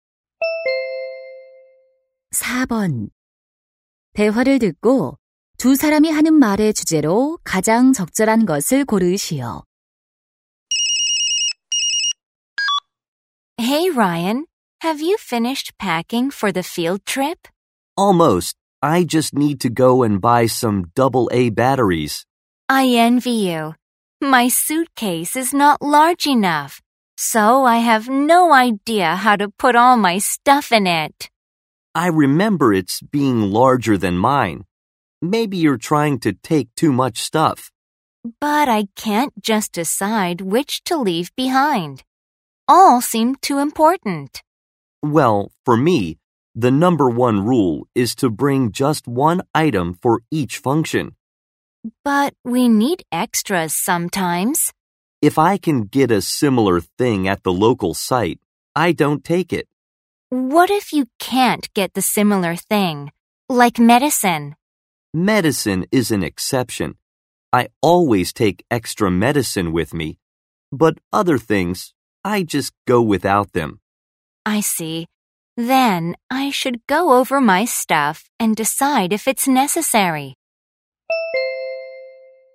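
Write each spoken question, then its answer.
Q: 대화를 듣고 두 사람이 하는 말의 주제로 가장 적절한 것을 고르시오.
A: 여행 짐을 꼭 필요한 것만 챙기는 방법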